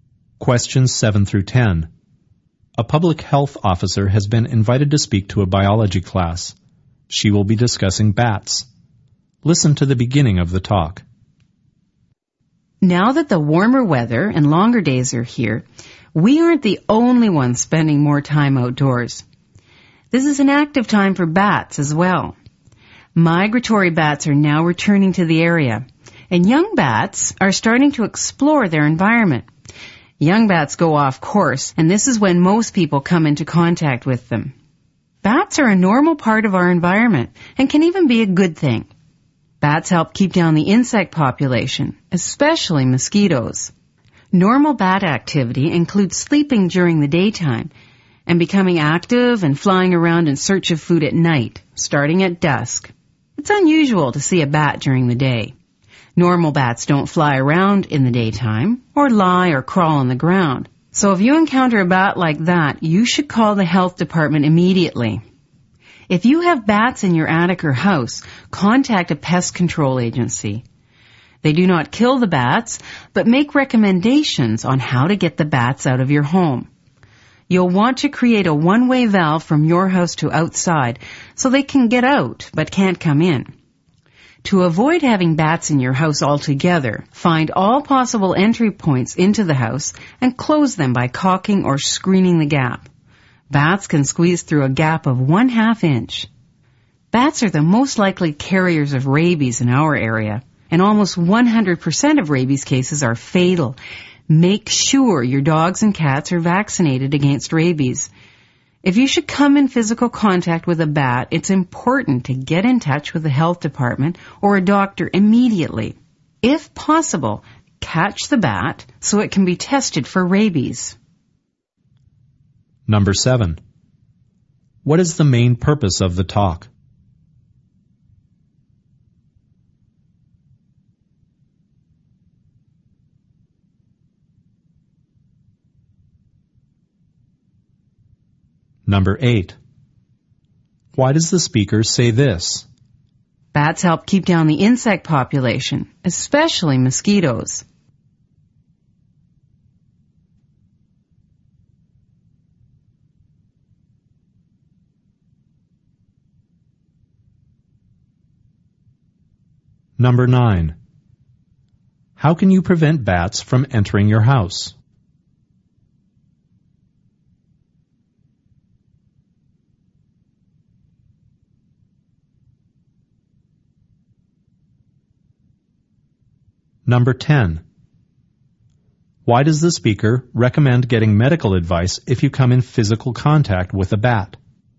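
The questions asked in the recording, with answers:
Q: What is the main purpose of the talk?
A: To inform people about bats and how to deal with them safely

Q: Why does the speaker say this?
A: To show that bats can be beneficial

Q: How can you prevent bats from entering your house?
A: Find all possible entry points and close them by caulking or screening the gaps

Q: Why does the speaker recommend getting medical advice if you come in physical contact with a bat?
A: Bats may carry rabies, which is almost always fatal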